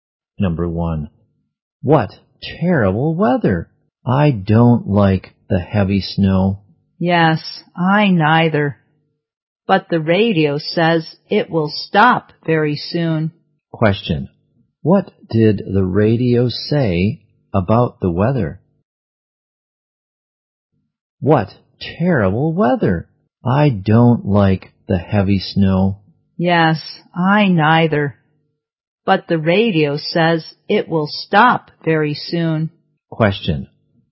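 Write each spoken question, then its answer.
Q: what did the radio say about the weather?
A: The snow will stop very soon.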